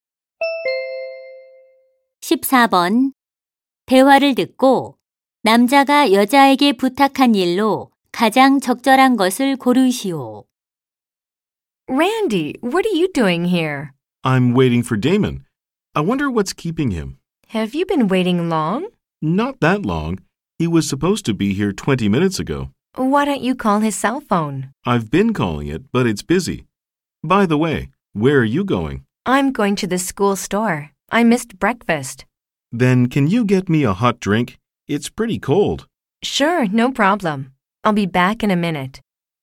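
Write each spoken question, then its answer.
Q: 대화를 듣고 남자가 여자에게 부탁한 일로 가장 적절한 것을 고르시오.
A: 따뜻한 음료 사다 주기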